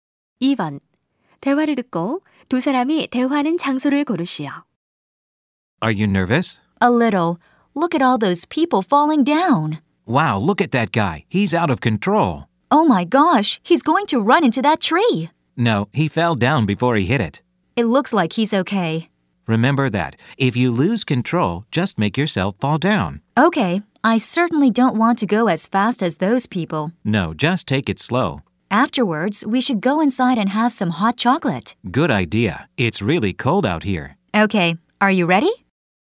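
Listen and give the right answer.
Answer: 스키장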